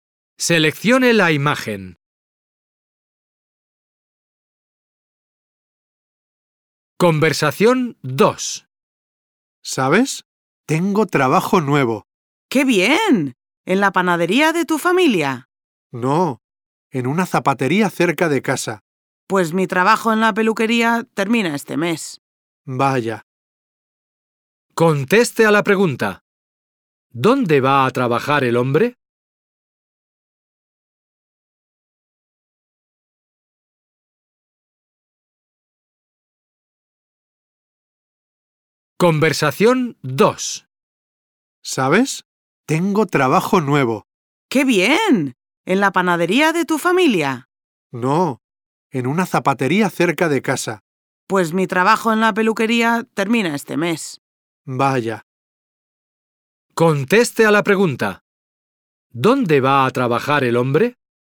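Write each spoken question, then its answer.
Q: ¿Dónde va a trabajar el hombre?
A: En una zapatería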